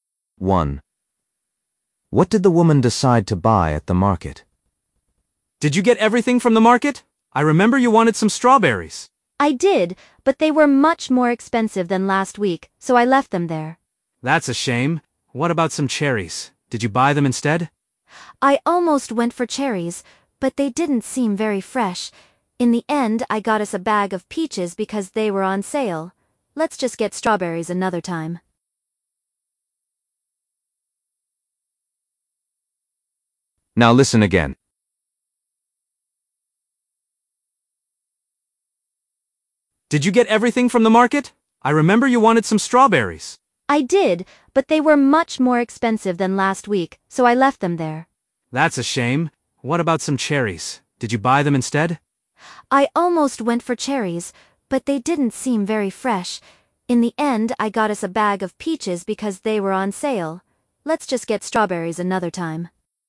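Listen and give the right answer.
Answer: peaches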